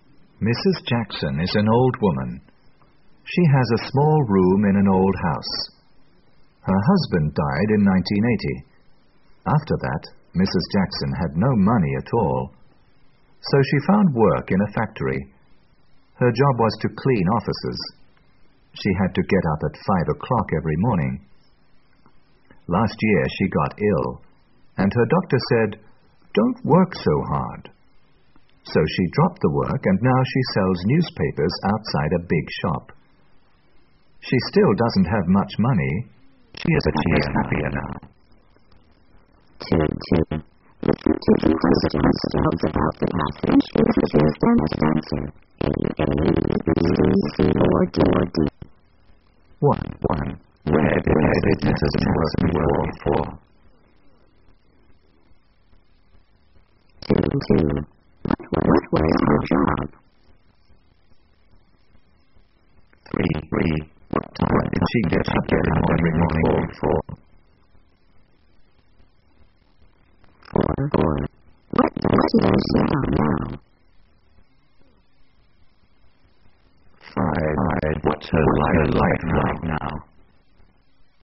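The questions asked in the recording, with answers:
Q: Where did Mrs. Jackson work before?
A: In a factory

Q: What was her job?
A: To clean offices

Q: What time did she get up every morning?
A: At 5 o'clock

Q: What does she do now?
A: She sells newspapers outside a big shop

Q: What's her life like right now?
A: She still doesn't have much money, but she is happier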